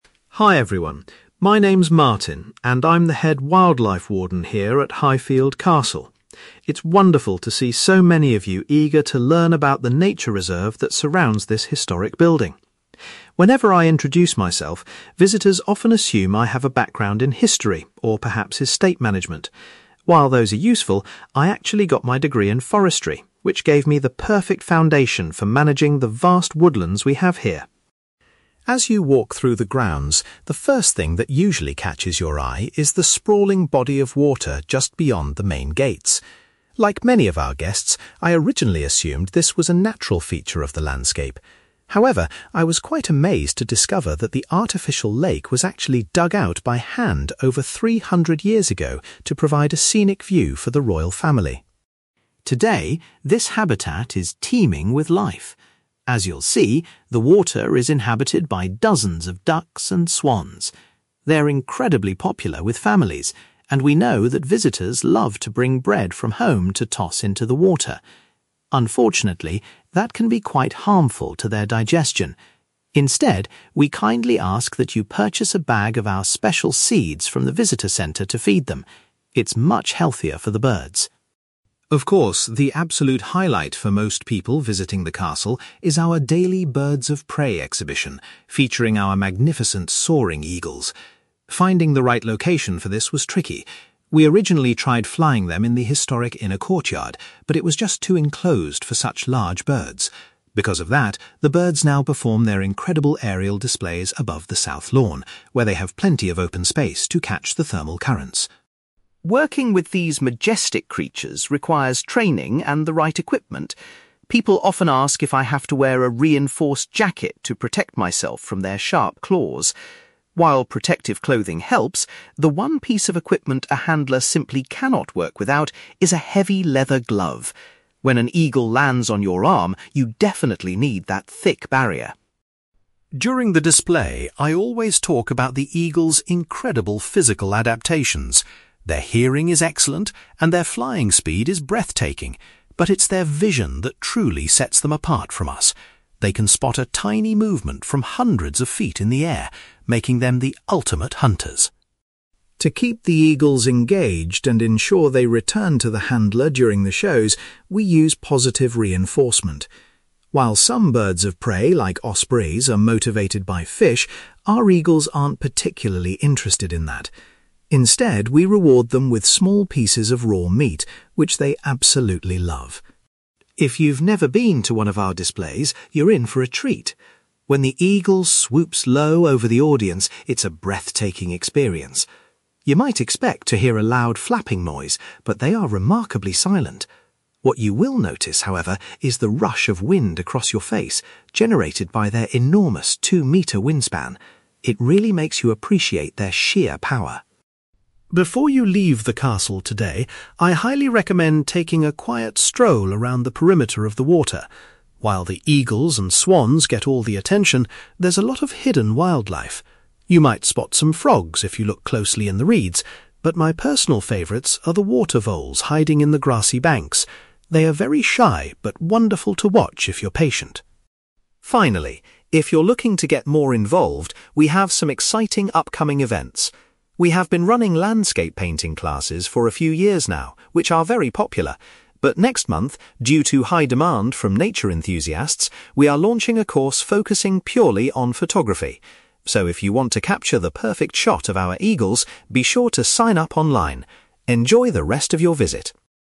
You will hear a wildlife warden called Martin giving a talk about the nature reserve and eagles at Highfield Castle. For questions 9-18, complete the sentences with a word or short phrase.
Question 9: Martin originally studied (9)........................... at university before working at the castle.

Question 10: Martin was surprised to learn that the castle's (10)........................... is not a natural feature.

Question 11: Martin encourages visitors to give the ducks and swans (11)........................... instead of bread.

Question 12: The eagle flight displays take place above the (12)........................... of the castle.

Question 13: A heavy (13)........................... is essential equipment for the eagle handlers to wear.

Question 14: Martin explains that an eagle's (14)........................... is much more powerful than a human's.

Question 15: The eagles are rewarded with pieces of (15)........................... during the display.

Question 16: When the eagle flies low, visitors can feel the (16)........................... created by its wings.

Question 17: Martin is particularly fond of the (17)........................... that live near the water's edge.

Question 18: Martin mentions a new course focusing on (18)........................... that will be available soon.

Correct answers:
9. forestry
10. artificial lake
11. special seeds
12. South Lawn
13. leather glove
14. vision
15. raw meat
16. wind
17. water voles
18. photography

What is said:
Martin: Hi everyone, my name is Martin, and I'm the head wildlife warden here at Highfield Castle. It's wonderful to see so many of you eager to learn about the nature reserve that surrounds this historic building. Whenever I introduce myself, visitors often assume I have a background in history or perhaps estate management. While those are useful, I actually got my degree in forestry, which gave me the perfect foundation for managing the vast woodlands we have here.
As you walk through the grounds, the first thing that usually catches your eye is the sprawling body of water just beyond the main gates. Like many of our guests, I originally assumed this was a natural feature of the landscape. However, I was quite amazed to discover that the artificial lake was actually dug out by hand over three hundred years ago to provide a scenic view for the royal family.
Today, this habitat is teeming with life. As you'll see, the water is inhabited by dozens of ducks and swans. They're incredibly popular with families, and we know that visitors love to bring bread from home to toss into the water. Unfortunately, that can be quite harmful to their digestion. Instead, we kindly ask that you purchase a bag of our special seeds from the visitor centre to feed them. It's much healthier for the birds!
Of course, the absolute highlight for most people visiting the castle is our daily birds of prey exhibition, featuring our magnificent soaring eagles. Finding the right location for this was tricky. We originally tried flying them in the historic inner courtyard, but it was just too enclosed for such large birds. Because of that, the birds now perform their incredible aerial displays above the South Lawn, where they have plenty of open space to catch the thermal currents.
Working with these majestic creatures requires training and the right equipment. People often ask if I have to wear a reinforced jacket to protect myself from their sharp claws. While protective clothing helps, the one piece of equipment a handler simply cannot work without is a heavy leather glove. When an eagle lands on your arm, you definitely need that thick barrier!
During the display, I always talk about the eagles' incredible physical adaptations. Their hearing is excellent, and their flying speed is breathtaking, but it's their vision that truly sets them apart from us. They can spot a tiny movement from hundreds of feet in the air, making them the ultimate hunters.
To keep the eagles engaged and ensure they return to the handler during the shows, we use positive reinforcement. While some birds of prey, like ospreys, are motivated by fish, our eagles aren't particularly interested in that. Instead, we reward them with small pieces of raw meat, which they absolutely love.
If you've never been to one of our displays, you're in for a treat. When the eagle swoops low over the audience, it's a breathtaking experience. You might expect to hear a loud flapping noise, but they are remarkably silent. What you will notice, however, is the rush of wind across your face, generated by their enormous two-metre wingspan. It really makes you appreciate their sheer power.
Before you leave the castle today, I highly recommend taking a quiet stroll around the perimeter of the water. While the eagles and swans get all the attention, there's a lot of hidden wildlife. You might spot some frogs if you look closely in the reeds, but my personal favourites are the water voles hiding in the grassy banks. They are very shy, but wonderful to watch if you're patient.
Finally, if you're looking to get more involved, we have some exciting upcoming events. We have been running landscape painting classes for a few years now, which are very popular. But next month, due to high demand from nature enthusiasts, we are launching a course focusing purely on photography. So if you want to capture the perfect shot of our eagles, be sure to sign up online. Enjoy the rest of your visit!

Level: B2